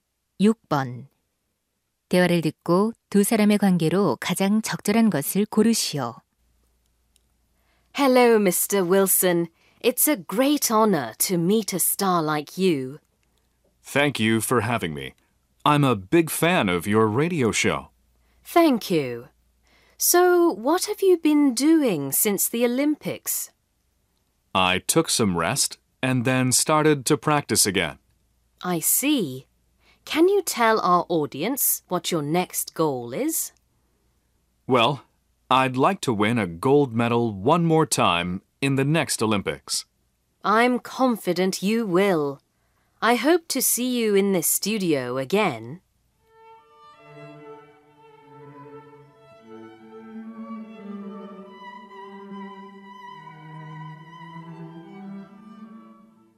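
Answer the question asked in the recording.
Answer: 라디오 진행자 - 올림픽 선수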